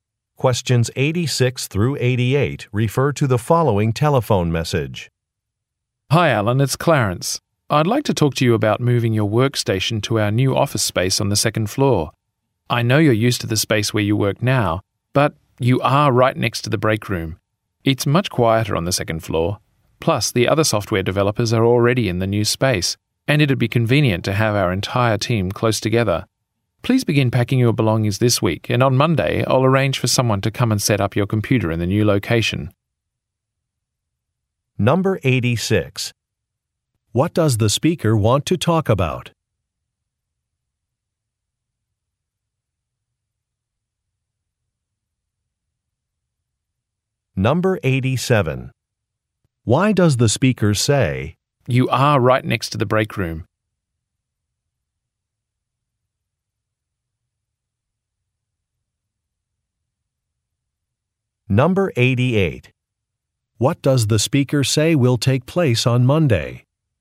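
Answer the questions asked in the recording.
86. Moving Alan's workstation to the new second-floor office
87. His current location is noisy
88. Someone will set up his computer in the new location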